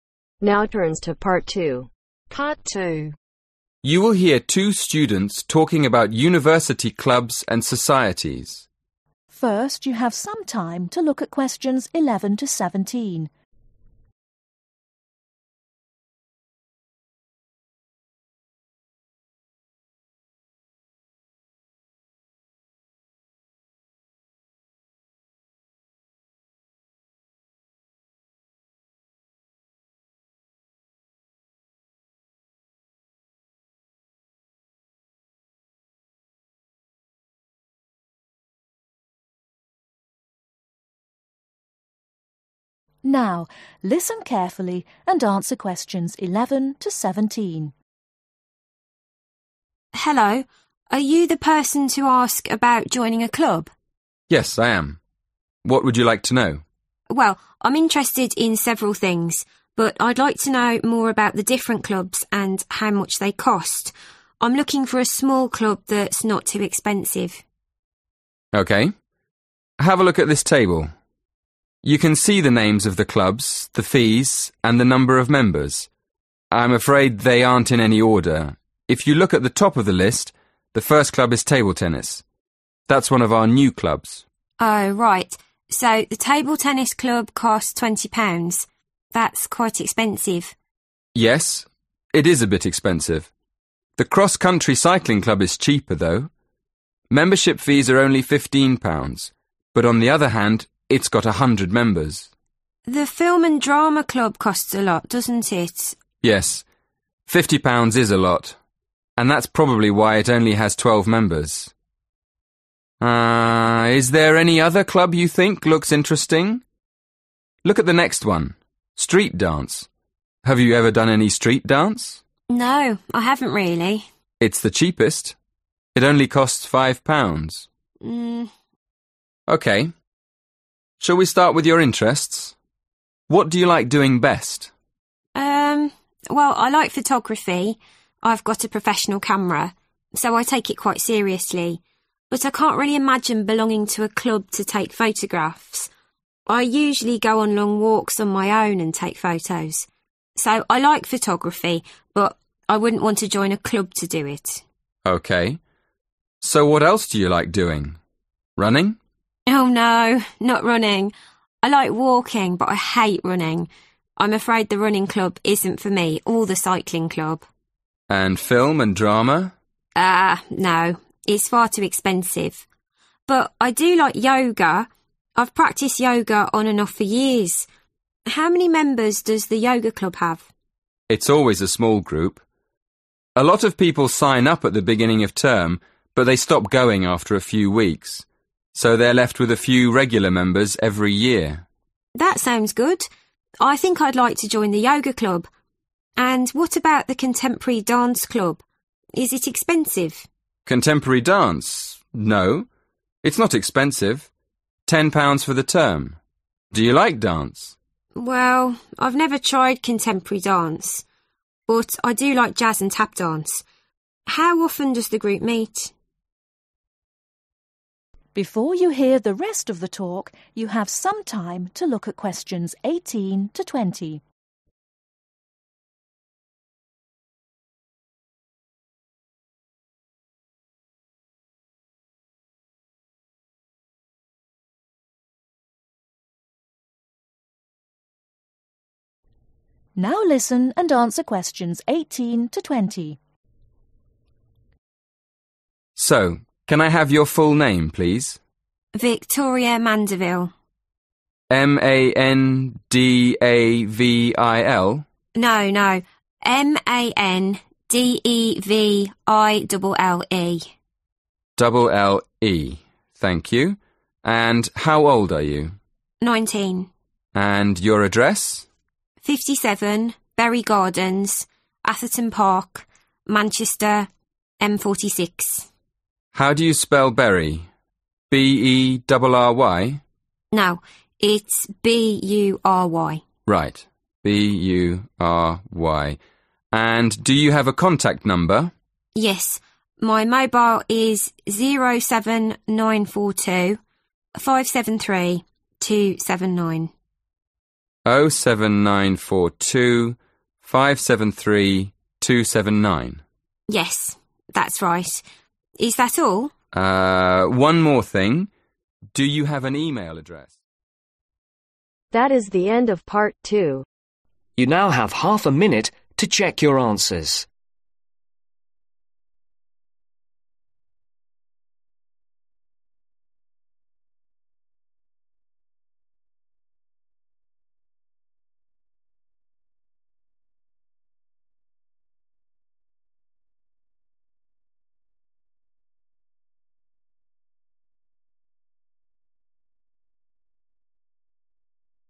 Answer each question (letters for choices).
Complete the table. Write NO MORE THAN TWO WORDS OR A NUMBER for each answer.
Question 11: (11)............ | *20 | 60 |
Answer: Table Tennis

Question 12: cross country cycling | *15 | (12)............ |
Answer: 100

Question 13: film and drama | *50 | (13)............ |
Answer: 12

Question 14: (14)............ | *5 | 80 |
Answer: Street dance

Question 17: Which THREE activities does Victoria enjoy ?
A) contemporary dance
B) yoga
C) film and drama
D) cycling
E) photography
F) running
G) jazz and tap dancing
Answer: G

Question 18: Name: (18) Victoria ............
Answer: Mandeville

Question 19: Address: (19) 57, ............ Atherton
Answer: Bury Gardens